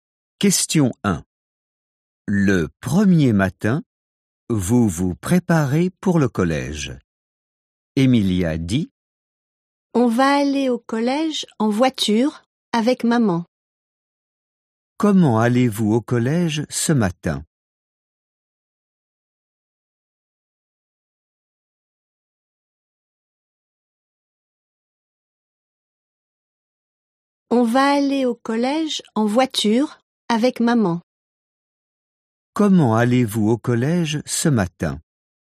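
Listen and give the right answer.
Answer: En voiture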